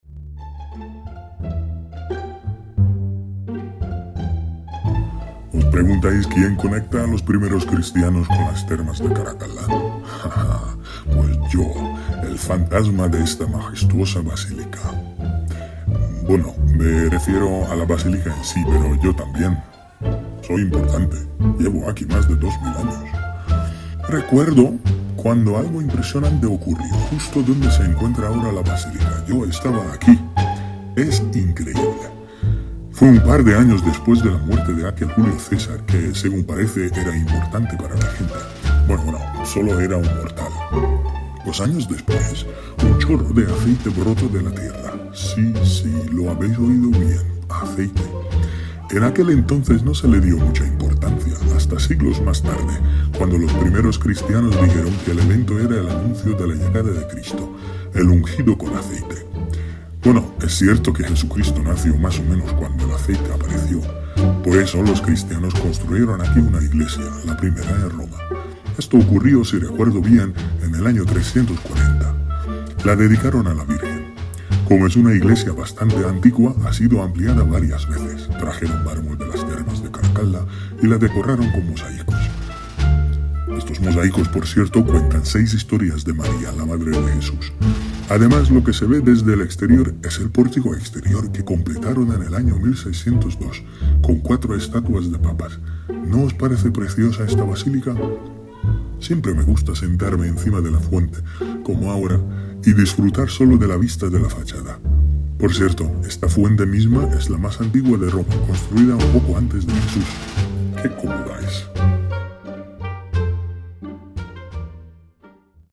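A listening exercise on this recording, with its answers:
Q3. ¿De dónde sacaron el mármol para decorar y reconstruir la Basílica de Santa María en Trastevere?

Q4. ¿Qué brotó de la tierra en el lugar donde está ahora la Basílica de Santa María de Trastevere?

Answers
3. De las termas de Caracalla
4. Un chorro de aceite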